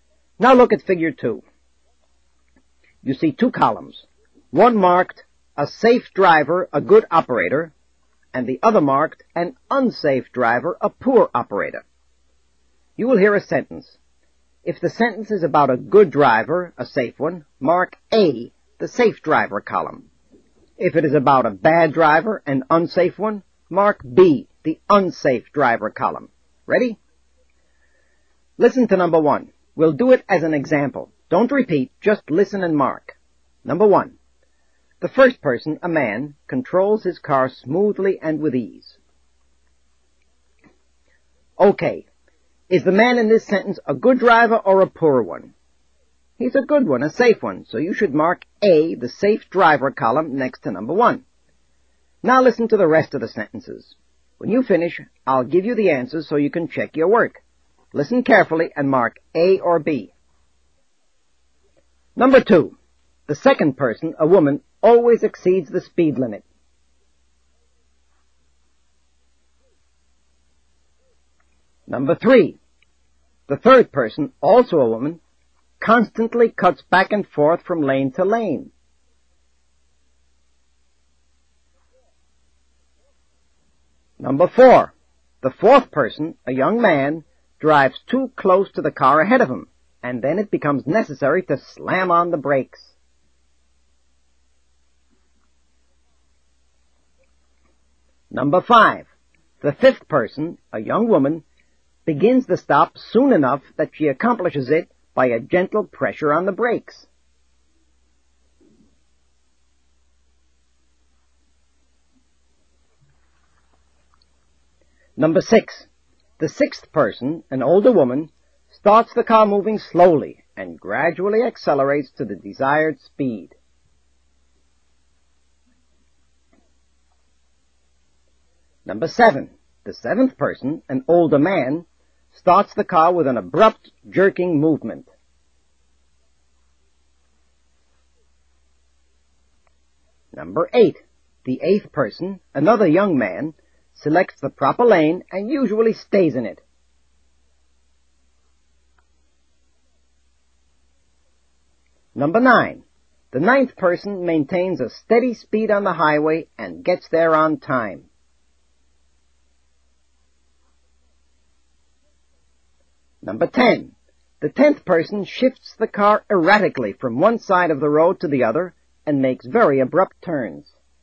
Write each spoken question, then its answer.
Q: The second person, a woman, always exceeds the speed limit.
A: For number 2, you should have marked B.

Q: the third person, also a woman, constantly cuts back and forth from lane to lane.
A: Number 3 should be marked B also.

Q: the fourth person, a young man, drives too close to the car ahead of him, and then it becomes necessary to slam on the brakes.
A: The answer to number 4 is B.

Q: the fifth person, a young woman, begins the stop soon enough that she accomplishes it by a gentle pressure on the brakes.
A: Number 5 is A.

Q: The sixth person, an older woman, starts the car moving slowly and gradually accelerates to the desired speed.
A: Number 6 is also a good driver.

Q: The seventh person, an older man, starts the car with an abrupt, jerking movement.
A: Number 7 is B.

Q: The eighth person, another young man, selects the proper lane and usually stays in it.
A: For number 8, you should have marked A

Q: The ninth person maintains a steady speed on the highway and gets there on time.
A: number 9, also A.

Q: The tenth person shifts the car erratically from one side of the road to the other and makes very abrupt turns.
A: And the answer to the last one, number 10, is B.